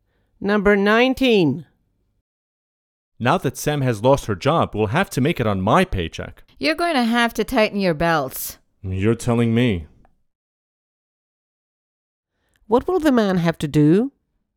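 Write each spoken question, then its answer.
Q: What will the man have to do?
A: Tighten his belt and spend less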